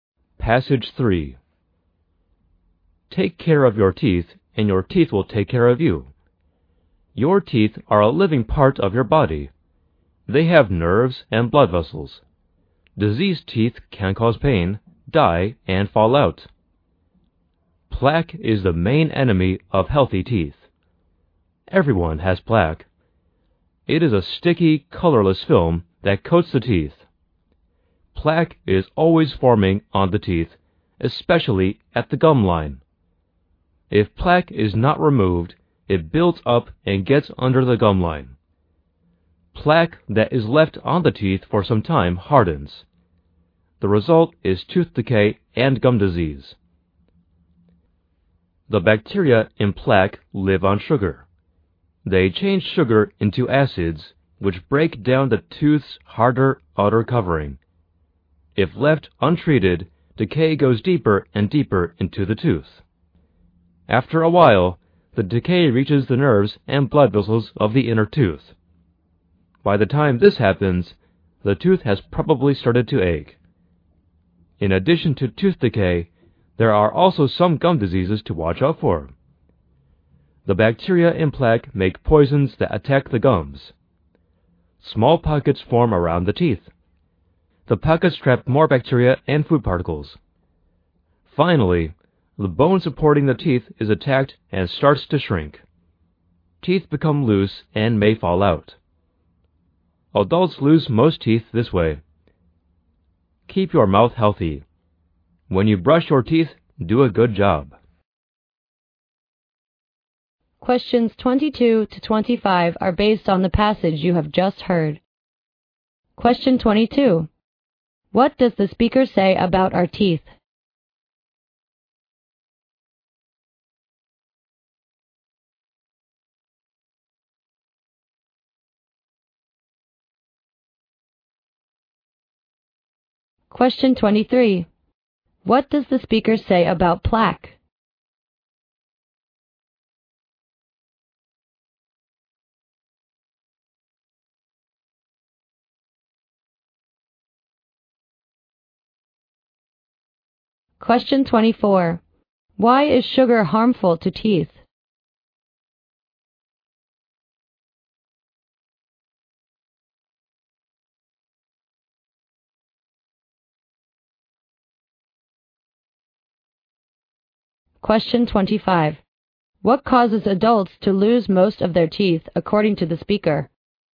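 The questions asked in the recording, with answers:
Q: What does the speaker say about our teeth?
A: They are a living part of the body, with nerves and blood vessels.

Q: What does the speaker say about plaque?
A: It is the main enemy of healthy teeth; it is a sticky, colorless film that is always forming on the teeth.

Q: Why is sugar harmful to teeth?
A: Bacteria in plaque change sugar into acids that break down the tooth's outer covering.

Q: What causes adults to lose most of their teeth, according to the speaker?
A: Gum disease.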